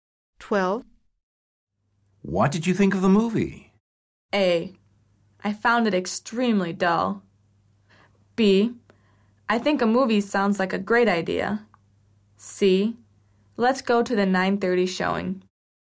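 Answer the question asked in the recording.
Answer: A: I found it extremely dull.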